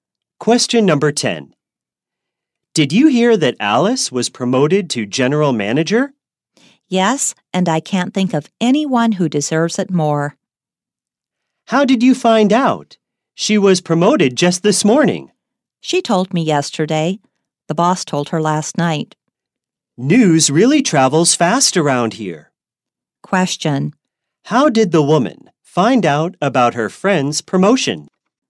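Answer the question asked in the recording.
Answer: Alice told her yesterday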